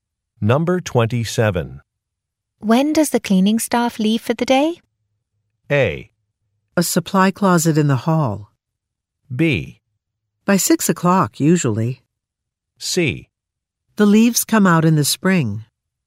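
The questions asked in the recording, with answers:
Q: When does the cleaning staff leave for the day?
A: B: By 6 o'clock, usually.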